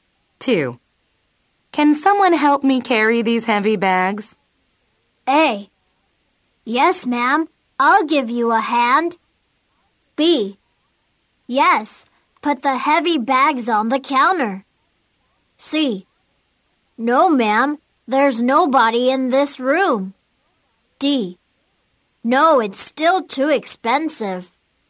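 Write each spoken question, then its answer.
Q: Can someone help me carry these heavy bags?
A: A: Yes, ma'am. I'll give you a hand.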